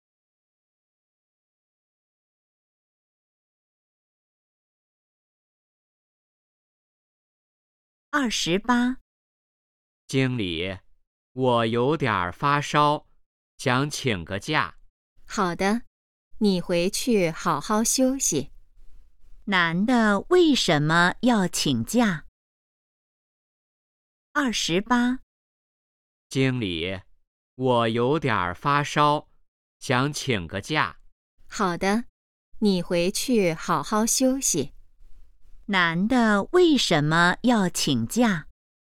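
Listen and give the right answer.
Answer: 发烧了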